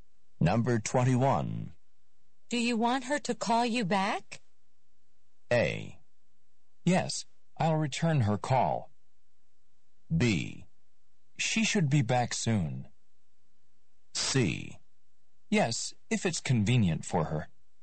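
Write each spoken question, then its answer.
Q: Do you want her to call you back?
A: C: Yes, if it's convenient for her.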